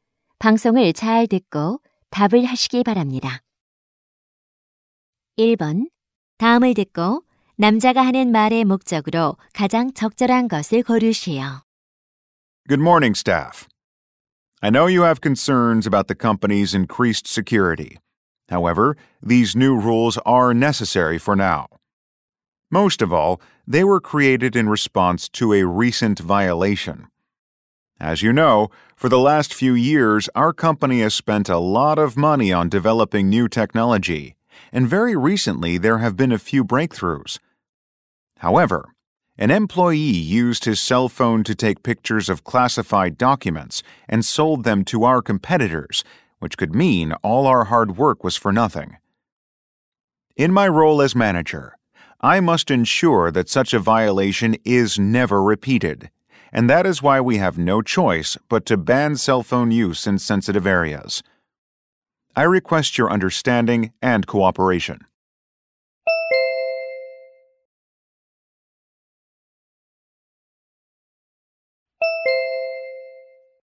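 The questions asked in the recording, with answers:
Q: 다음을 듣고 남자가 하는 말의 목적으로 가장 적절한 것을 고르시오.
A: 민감한 구역에서 휴대전화 사용을 금지하는 이유를 설명하고 협조를 요청하려고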